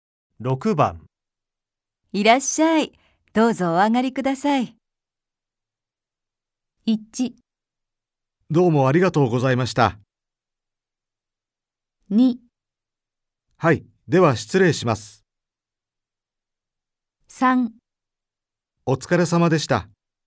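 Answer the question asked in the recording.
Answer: 2: はい、では失礼します。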